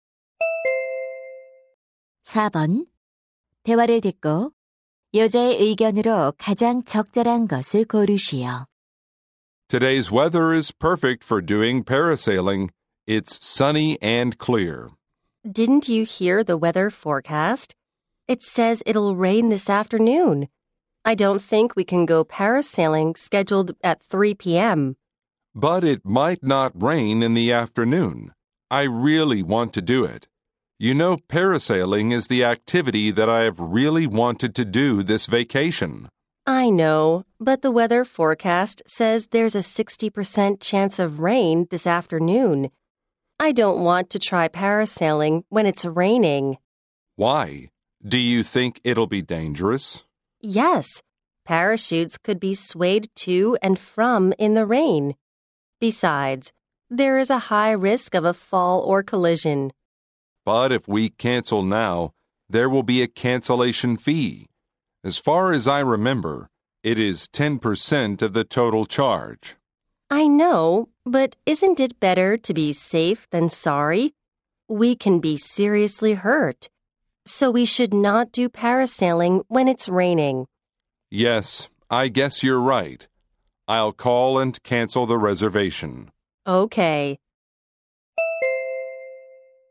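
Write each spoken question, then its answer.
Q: 대화를 듣고 여자의 의견으로 가장 적절한 것을 고르시오.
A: 비가 올 때는 패러세일링을 하면 안 된다.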